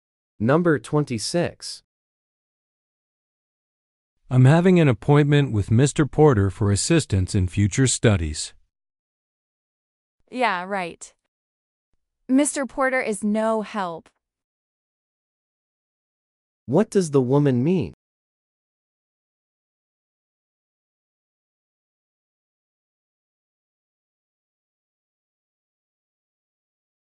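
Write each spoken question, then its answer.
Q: What does the woman mean?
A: Mr. Porter won't be helpful.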